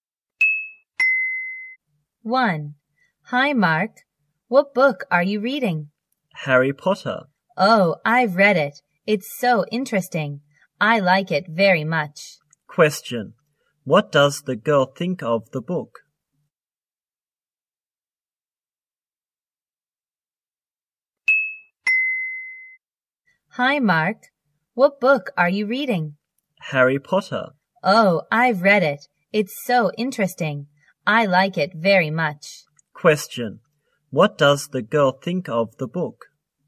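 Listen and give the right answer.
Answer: It's very interesting; she likes it very much.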